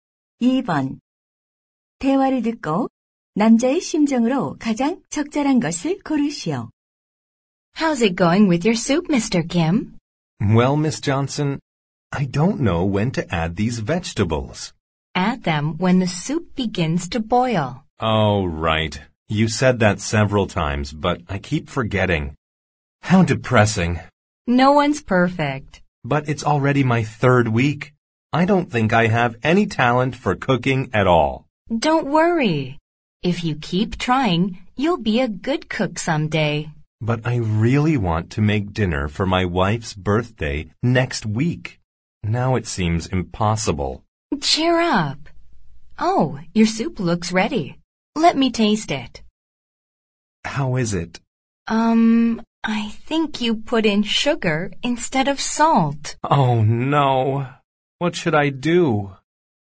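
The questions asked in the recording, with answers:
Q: 대화를 듣고 남자의 심정으로 가장 적절한 것을 고르시오.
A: 낙담함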